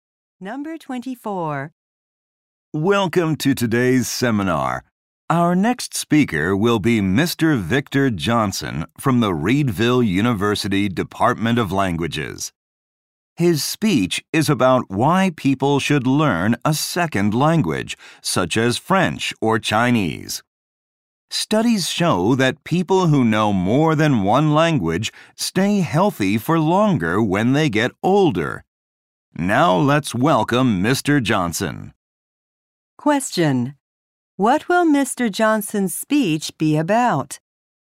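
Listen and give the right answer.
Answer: Why people should learn a second language.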